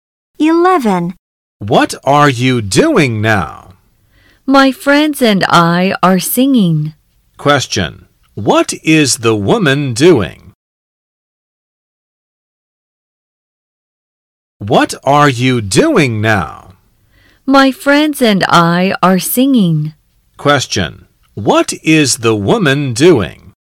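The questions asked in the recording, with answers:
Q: What is the woman doing?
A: She is singing with her friends.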